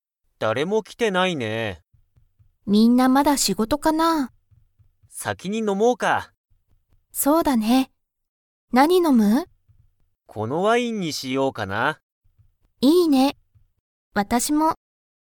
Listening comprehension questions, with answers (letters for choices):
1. けんとえりは、先(さき)に飲(の)みますか?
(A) はい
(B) いいえ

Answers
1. A

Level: Level 1